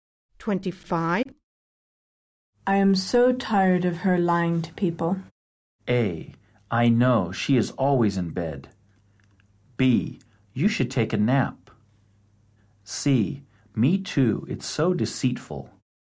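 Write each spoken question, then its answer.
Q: I am so tired of her lying to people.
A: C: Me too. It's so deceitful.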